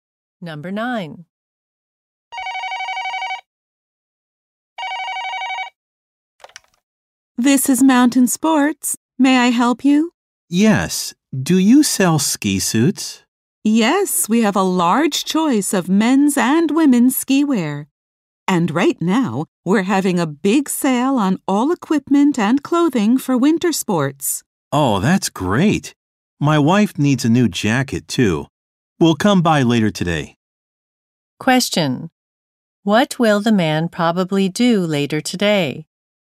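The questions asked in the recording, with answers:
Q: What will the man probably do later today?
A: Go to the store to buy ski wear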